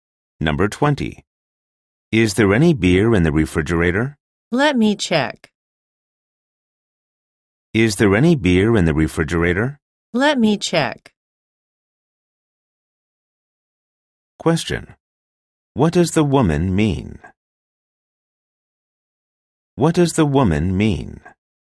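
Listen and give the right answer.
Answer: She will look in the refrigerator to see whether there is any beer.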